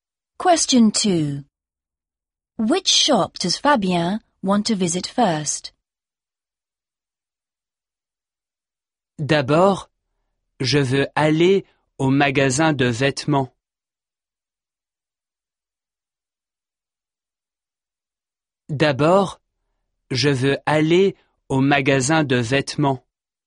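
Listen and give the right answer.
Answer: The clothes shop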